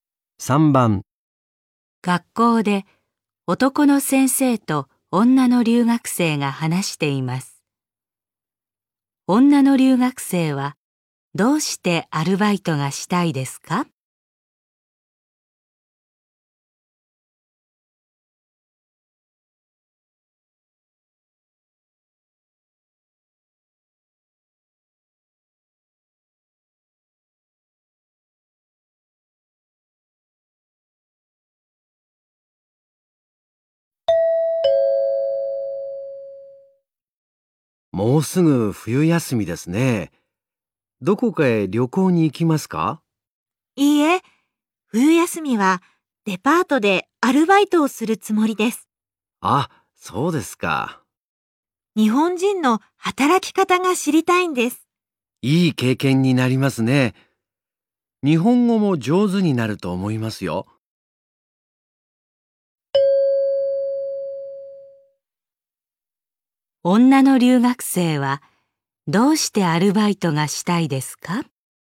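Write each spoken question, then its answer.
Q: 女の留学生はどうしてアルバイトがしたいですか?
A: 日本人の働き方が知りたいから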